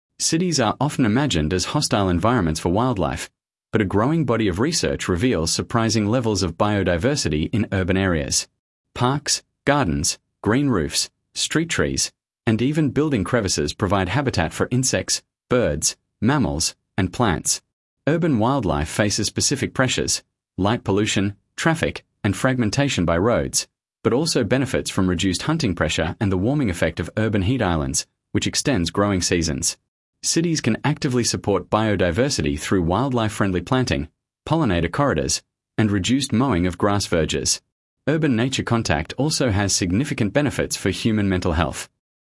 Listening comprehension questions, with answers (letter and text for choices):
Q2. Sample Text 2 — Urban Biodiversity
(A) A. Cities are hostile environments for most species because pollution and fragmentation prevent wildlife from surviving.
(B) B. Urban green spaces support surprising levels of biodiversity that benefit both wildlife and the mental health of city residents.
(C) C. The only way to protect biodiversity is through the creation of large national parks far from urban development.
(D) D. Urban pollinators are exclusively honeybees, which are declining rapidly due to pesticide use in city gardens.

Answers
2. (B) B. Urban green spaces support surprising levels of biodiversity that benefit both wildlife and the mental health of city residents.